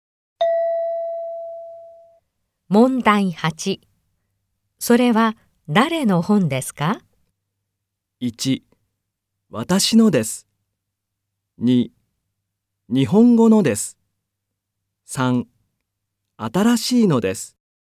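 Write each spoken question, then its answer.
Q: それは誰の本ですか?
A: 1: 私のです。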